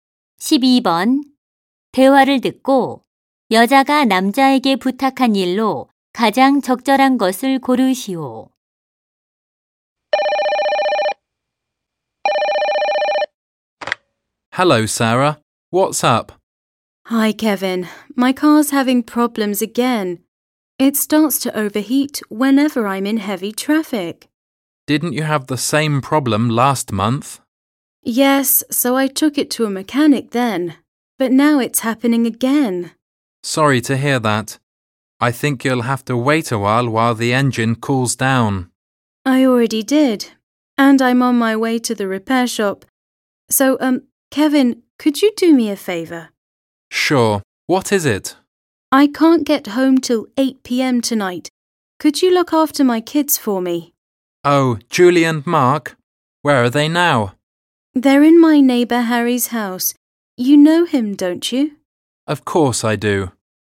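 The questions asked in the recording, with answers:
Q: 대화를 듣고 여자가 남자에게 부탁한 일로 가장 적절한 것을 고르시오.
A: 아이들 돌봐 주기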